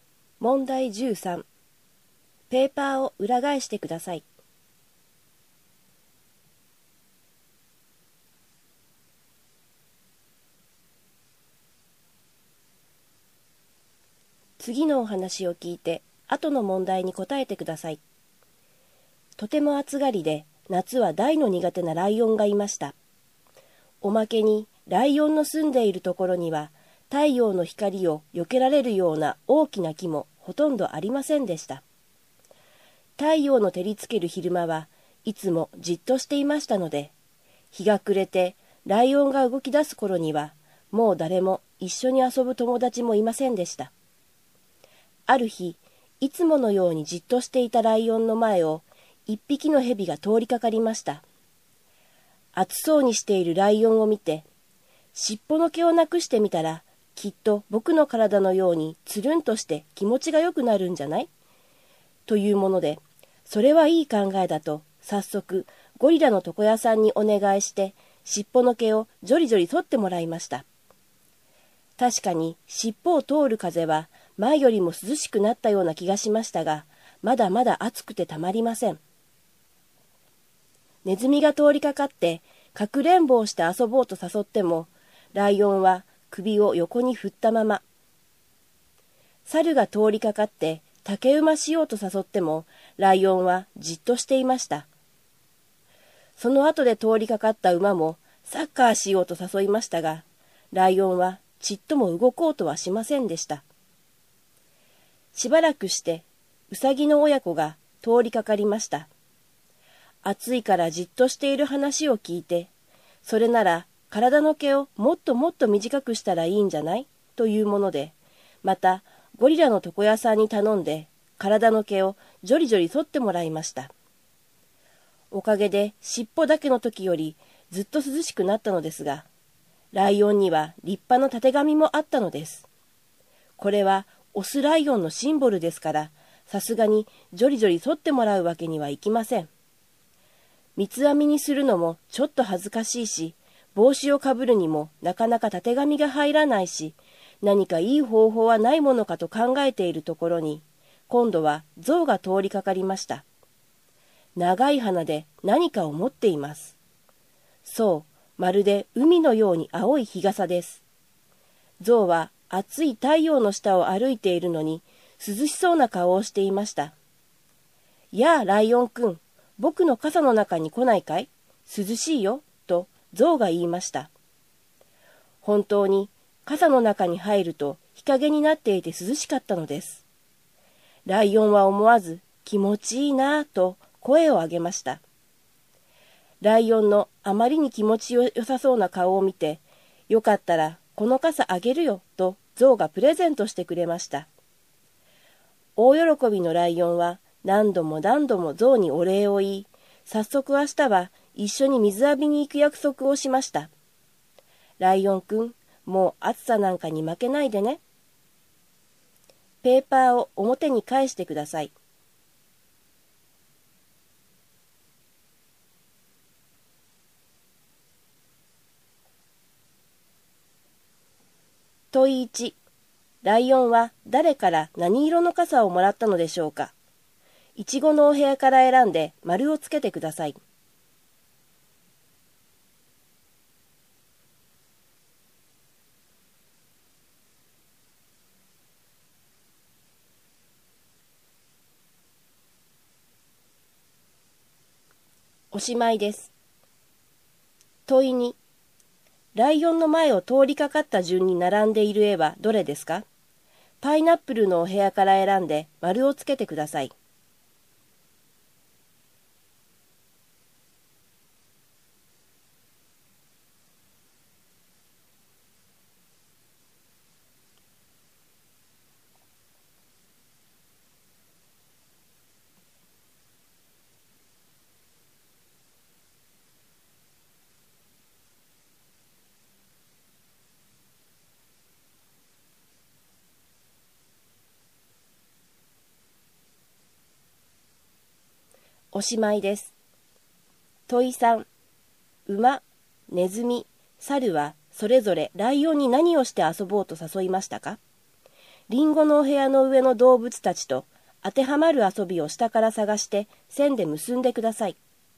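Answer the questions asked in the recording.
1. 象から青い傘
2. 蛇、ネズミ、猿、馬、ウサギの親子、象
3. 馬はサッカー、ネズミはかくれんぼ、猿は竹馬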